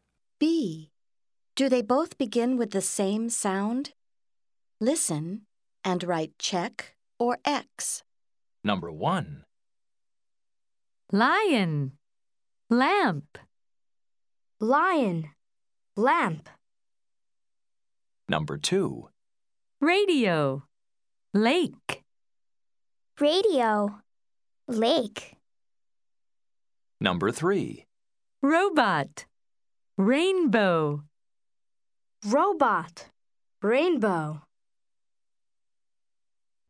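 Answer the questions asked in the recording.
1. Yes (lion, lamp)
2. No (radio, lake)
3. Yes (robot, rainbow)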